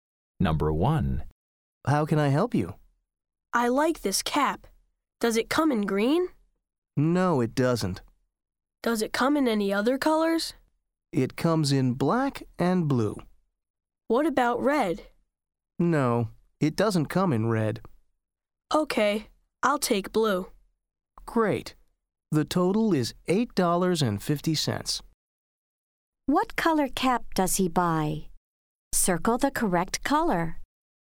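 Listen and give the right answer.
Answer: blue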